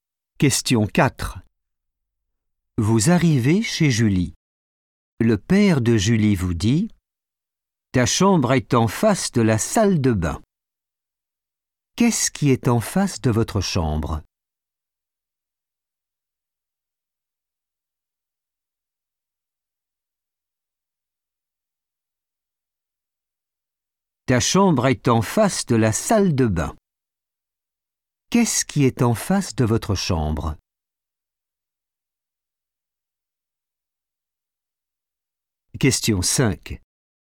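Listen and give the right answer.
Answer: la salle de bain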